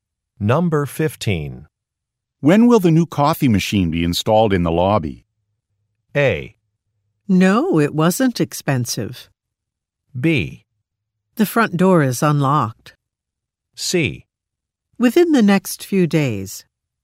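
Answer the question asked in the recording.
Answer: C: Within the next few days.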